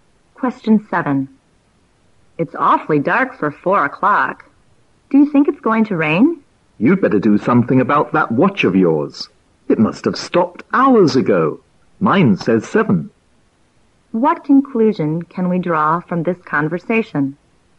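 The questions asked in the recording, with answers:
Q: What conclusion can we draw from this conversation?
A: The first speaker's watch has stopped; it is actually 7 o'clock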